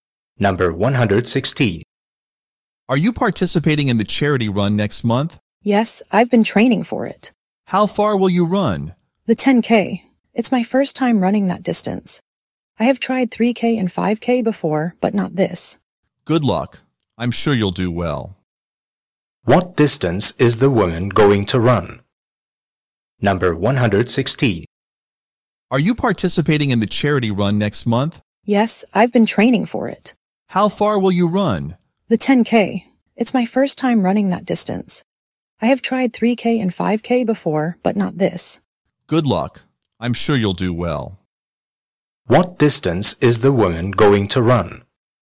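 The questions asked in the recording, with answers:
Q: What distance is the woman going to run?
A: 10K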